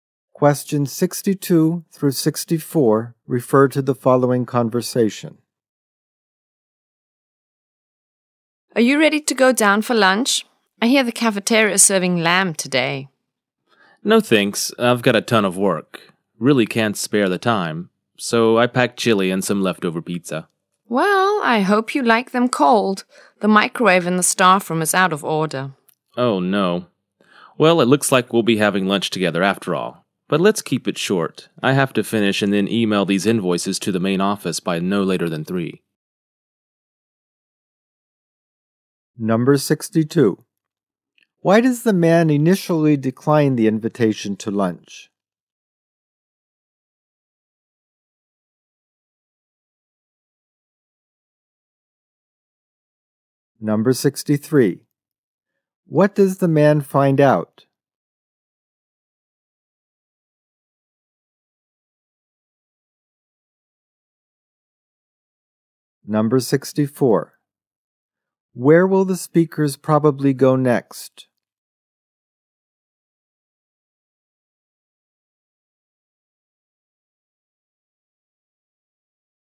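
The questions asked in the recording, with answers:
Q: Why does the man initially decline the invitation to lunch?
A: He has a lot of work

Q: What does the man find out?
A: The staff room microwave is out of order

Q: Where will the speakers probably go next?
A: To the cafeteria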